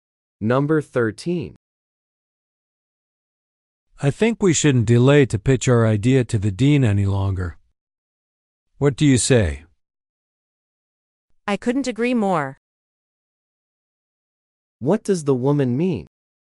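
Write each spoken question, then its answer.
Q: What does the woman mean?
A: She completely agrees that they should pitch the idea now.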